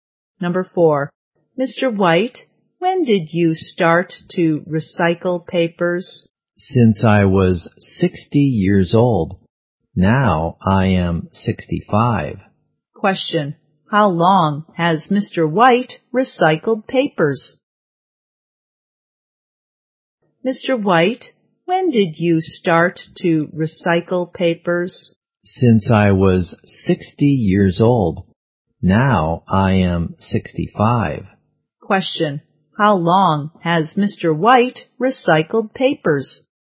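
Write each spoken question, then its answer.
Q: how long has Mr.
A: For 5 years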